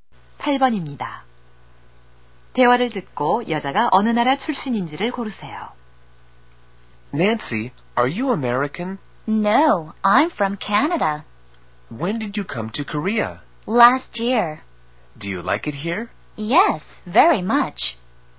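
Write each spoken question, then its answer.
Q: 대화를 듣고 여자가 어느 나라 출신인지를 고르세요.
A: 캐나다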